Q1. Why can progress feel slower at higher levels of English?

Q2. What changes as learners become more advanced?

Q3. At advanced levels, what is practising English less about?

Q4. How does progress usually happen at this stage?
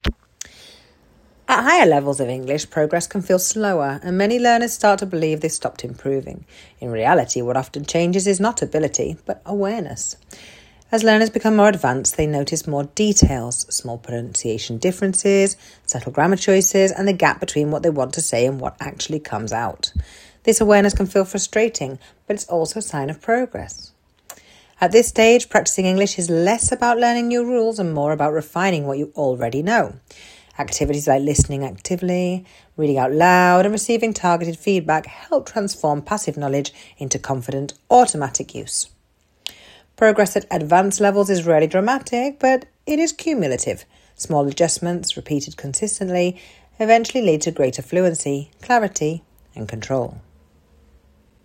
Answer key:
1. Because learners become more aware of details and gaps in their own language use, not because they have stopped improving.
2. They begin to notice small pronunciation differences, subtle grammar choices, and the difference between what they want to say and what they actually say.
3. It is less about learning new rules and more about refining and improving what they already know.
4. Through small, consistent adjustments that build up over time.